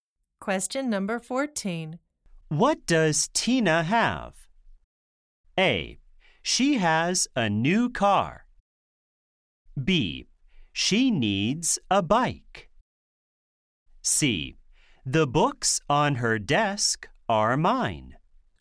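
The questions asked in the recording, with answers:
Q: What does Tina have?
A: A: She has a new car.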